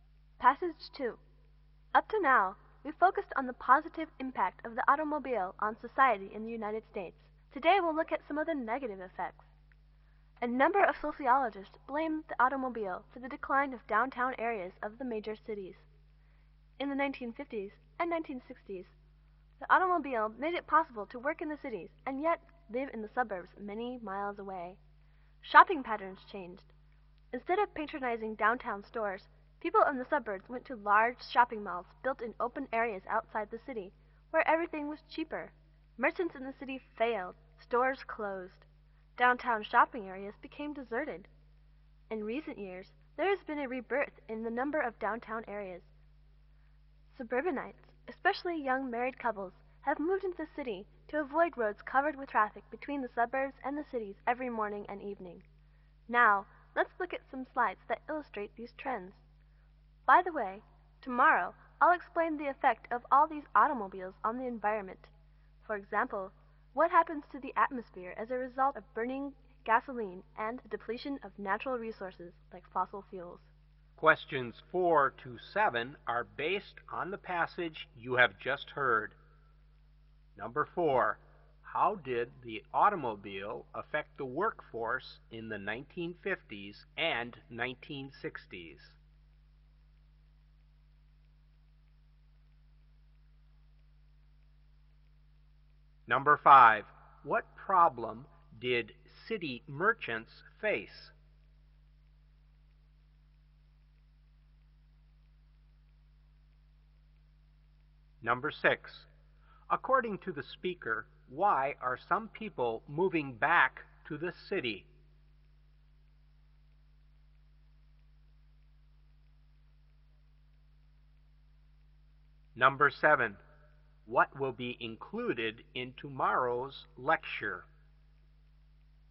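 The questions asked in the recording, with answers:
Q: How did the automobile affect the workforce in the 1950s and 1960s?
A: People could work in the cities and live in the suburbs

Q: What problem did city merchants face?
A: Suburban shoppers went to cheaper malls outside the city, so their stores failed

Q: According to the speaker, why are some people moving back to the city?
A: To avoid heavy commuting traffic between the suburbs and the city

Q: What will be included in tomorrow's lecture?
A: The effect of automobiles on the environment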